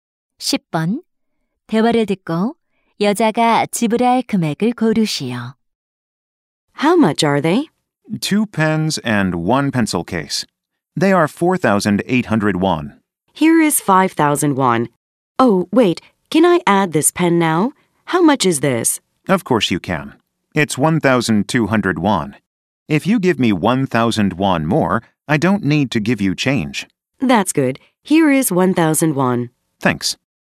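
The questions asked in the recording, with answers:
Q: 대화를 듣고 여자가 지불할 금액을 고르시오.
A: 6,000원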